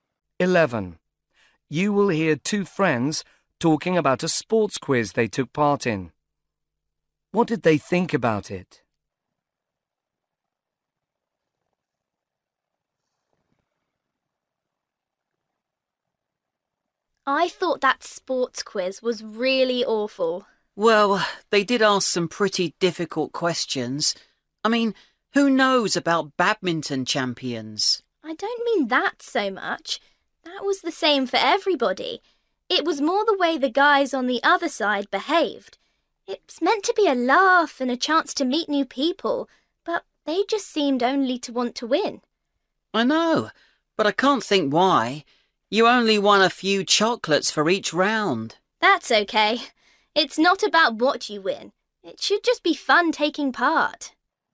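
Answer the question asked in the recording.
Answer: The other team was too competitive, which spoiled the fun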